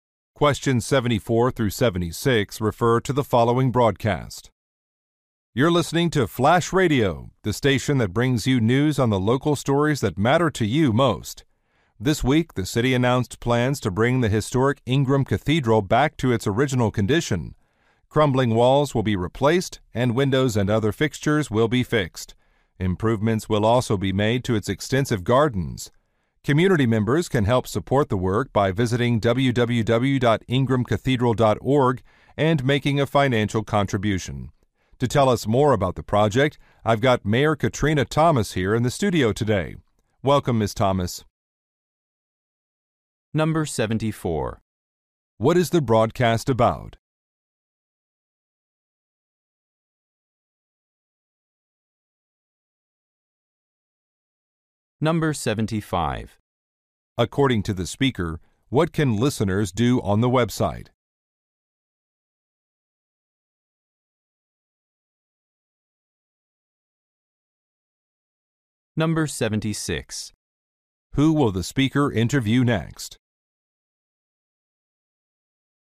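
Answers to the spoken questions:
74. Restoring the historic Ingram Cathedral
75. Make a donation
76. The mayor, Katrina Thomas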